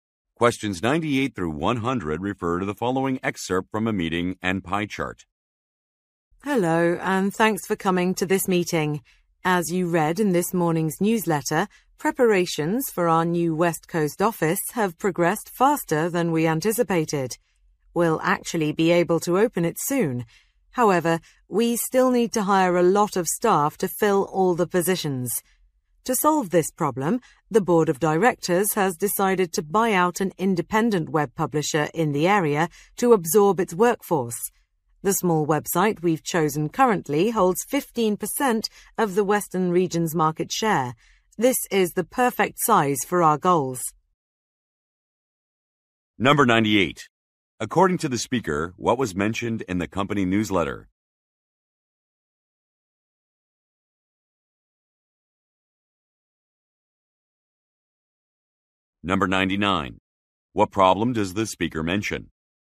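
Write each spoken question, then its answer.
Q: According to the speaker, what was mentioned in the company newsletter?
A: Preparations for the new office are ahead of schedule

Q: What problem does the speaker mention?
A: They need to hire many staff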